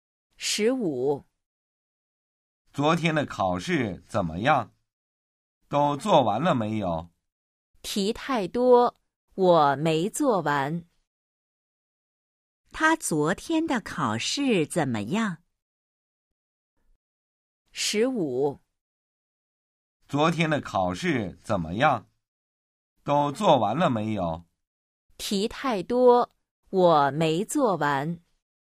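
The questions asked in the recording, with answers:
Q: 他昨天的考试怎么样?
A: 题太多,没做完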